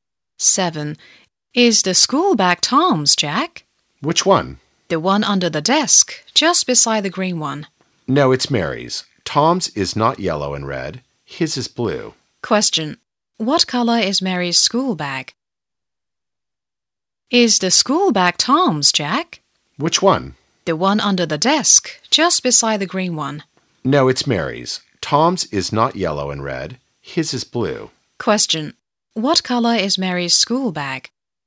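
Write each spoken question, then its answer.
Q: What color is Mary's school bag?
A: Yellow and red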